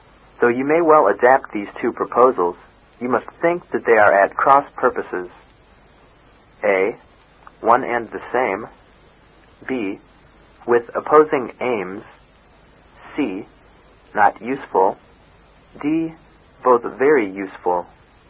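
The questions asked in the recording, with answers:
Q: Though you may well adapt these two proposals, you must think that they are at cross purposes.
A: B: With opposing aims.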